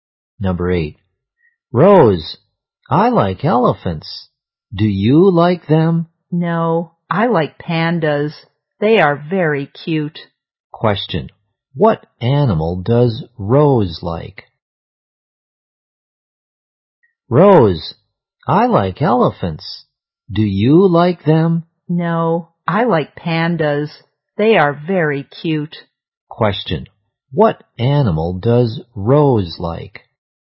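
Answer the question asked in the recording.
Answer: Pandas.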